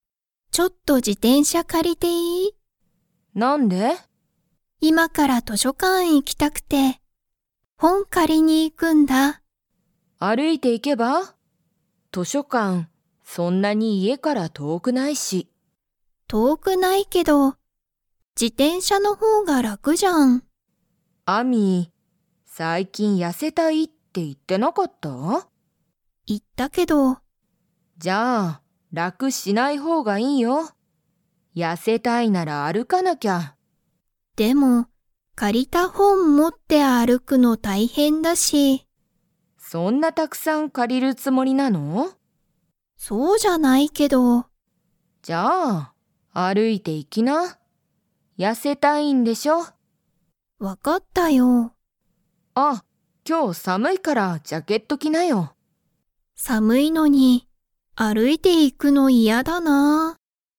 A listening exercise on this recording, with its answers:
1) アミは今(いま)から に行(い)きたい。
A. 自転車(じてんしゃ)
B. 図書館(としょかん)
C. 駅(えき)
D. 公園(こうえん)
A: B. 図書館(としょかん)

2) 今日(きょう)は寒(さむ)いですか?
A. はい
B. いいえ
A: A. はい

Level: Level 4

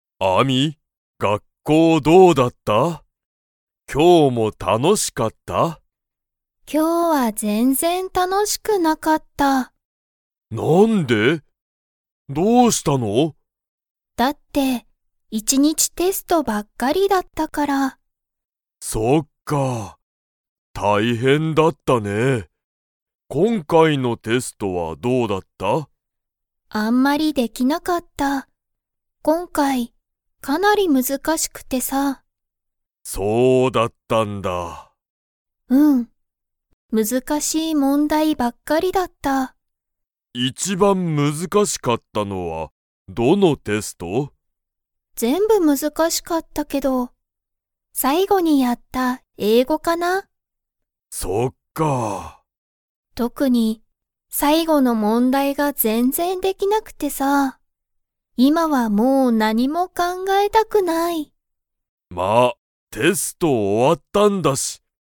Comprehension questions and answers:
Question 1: 今回こんかいのテストは難むずかしかったですか?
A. はい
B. いいえ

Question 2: ____の問題もんだいが全然ぜんぜんできなかった。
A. 最後さいご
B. 一番いちばん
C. 次つぎ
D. 勉強べんきょう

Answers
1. A. はい
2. A. 最後さいご

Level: Level 2

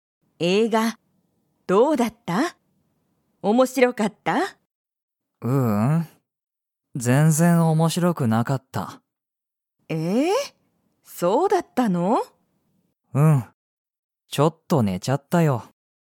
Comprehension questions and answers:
映画えいがは面白おもしろかったですか?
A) はい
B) いいえ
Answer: B) いいえ

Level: Level 1

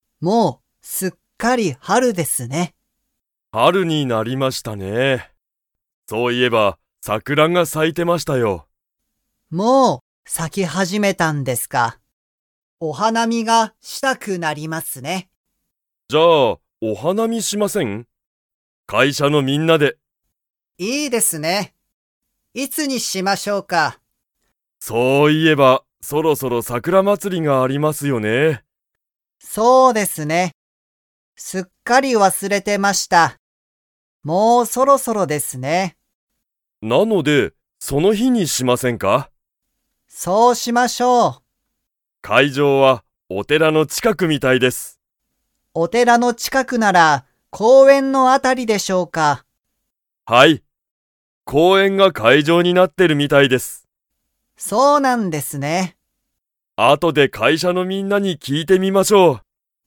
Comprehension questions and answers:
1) 桜さくらはもう咲さき始はじめましたか?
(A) はい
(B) いいえ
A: (A) はい

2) 桜祭さくらまつりの会場かいじょうは、 の近ちかくだ。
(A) 会社かいしゃ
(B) お寺てら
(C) 病院びょういん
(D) 学校がっこう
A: (B) お寺てら

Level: Level 4

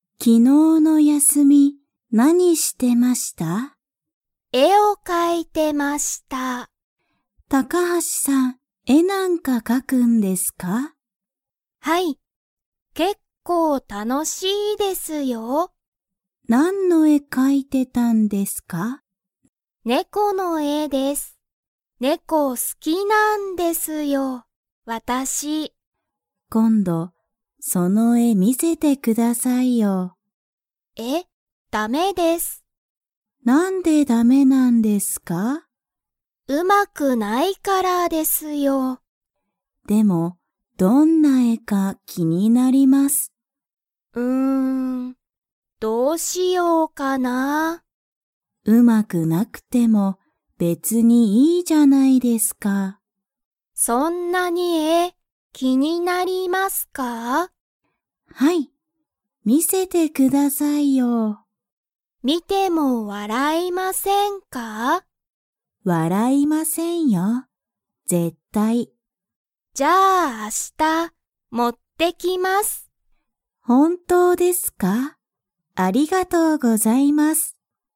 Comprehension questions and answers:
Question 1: 高橋たかはしさんは昨日きのう、何なんの絵えを描かいていましたか?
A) 犬いぬ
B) 猫ねこ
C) 山やま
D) 海うみ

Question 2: 高橋たかはしさんは、鈴木すずきさんに絵えを 。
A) 見みせる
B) 見みせない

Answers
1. B) 猫ねこ
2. A) 見みせる

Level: Level 3

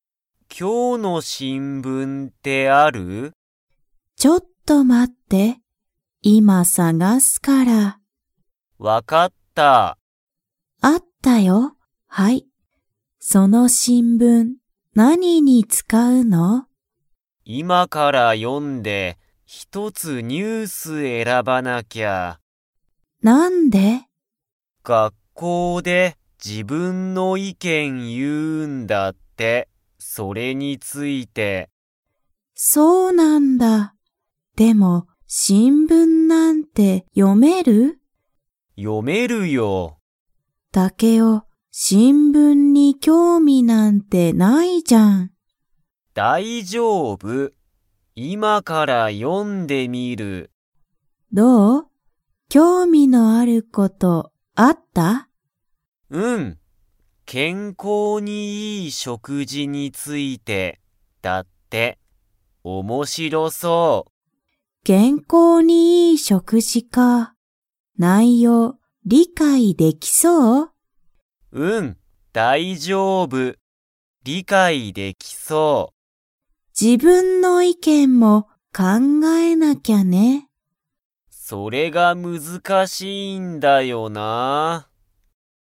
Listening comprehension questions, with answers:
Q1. タケオは、 の新聞しんぶんがほしい。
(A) 昨日きのう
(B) 今日きょう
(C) 明日あした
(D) この前まえ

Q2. タケオは、新聞しんぶんの内容ないようを理解りかいできそうですか?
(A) はい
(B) いいえ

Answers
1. (B) 今日きょう
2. (A) はい

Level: Level 3

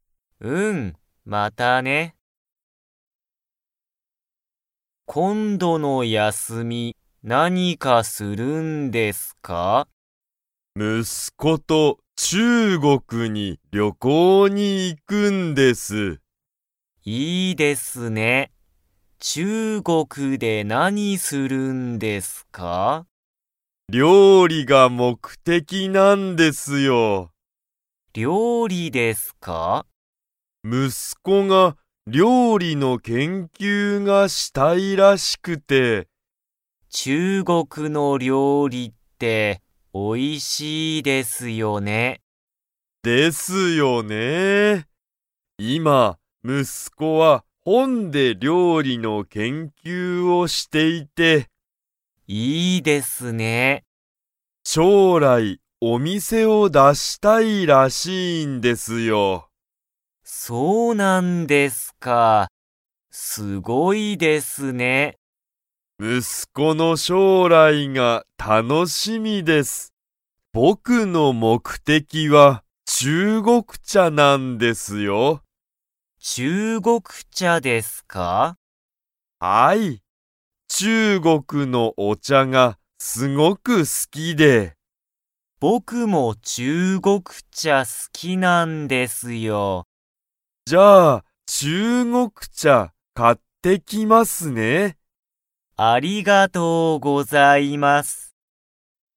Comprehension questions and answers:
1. は、料理りょうりの研究けんきゅうがしたい。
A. 酒井さかいさん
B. 酒井さかいさんの息子むすこ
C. 酒井さかいさんの妻つま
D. 酒井さかいさんの友人ゆうじん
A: B. 酒井さかいさんの息子むすこ

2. 上田うえださんは、中国茶ちゅうごくちゃが好すきですか?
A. はい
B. いいえ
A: A. はい

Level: Level 3

